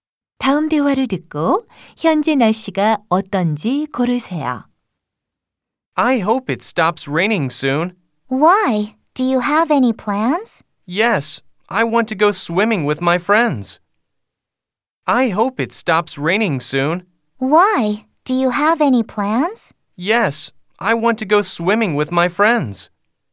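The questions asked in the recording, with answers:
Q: 다음 대화를 듣고 현재 날씨가 어떤지 고르세요.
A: 비가 오고 있다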